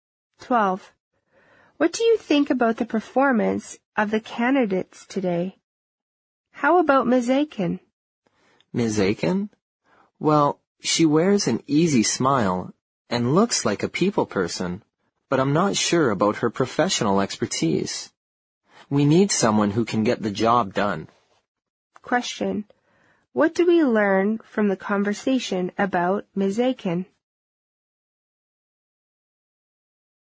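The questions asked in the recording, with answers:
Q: What do we learn from the conversation about Ms. Aiken?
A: She seems friendly and good with people, but her professional expertise is in doubt.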